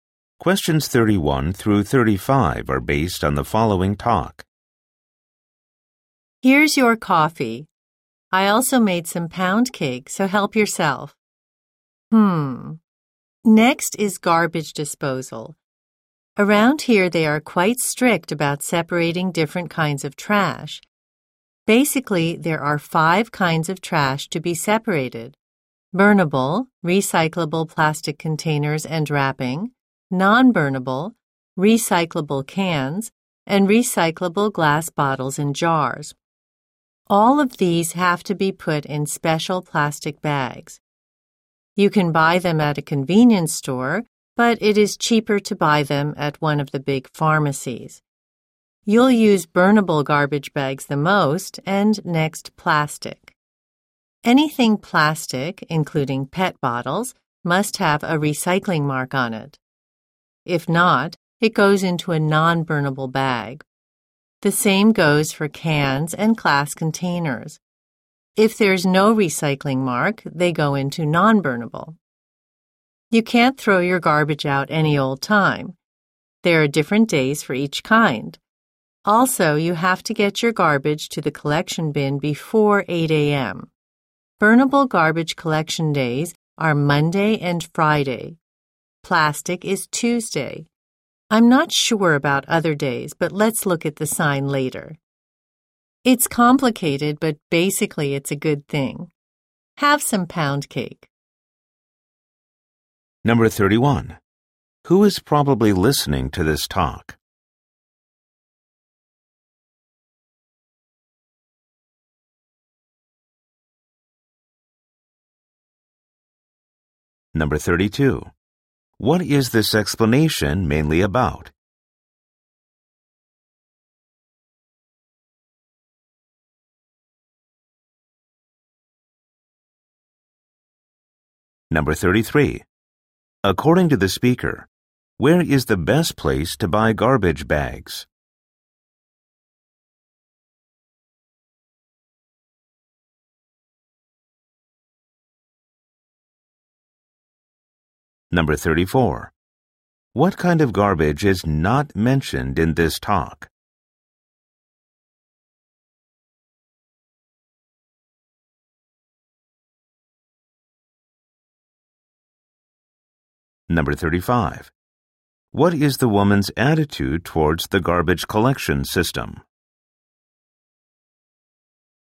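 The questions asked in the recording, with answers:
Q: Who is probably listening to this talk?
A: A new resident of the neighborhood

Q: What is this explanation mainly about?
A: How to sort and put out garbage

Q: According to the speaker, where is the best place to buy garbage bags?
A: At a big pharmacy

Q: What is the woman's attitude towards the garbage collection system?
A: It is complicated but basically a good thing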